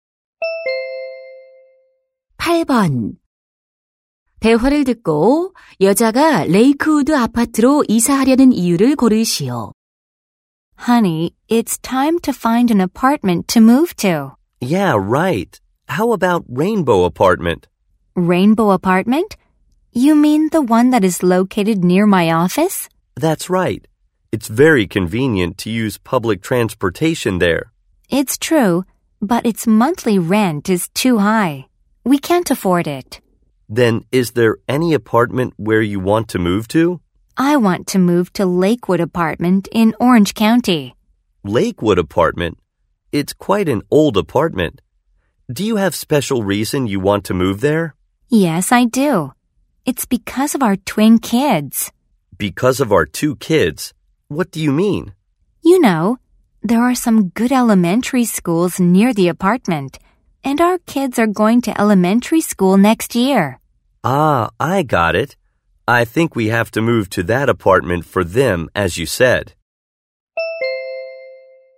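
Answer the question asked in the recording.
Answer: 아이들이 다닐 좋은 초등학교가 근처에 있어서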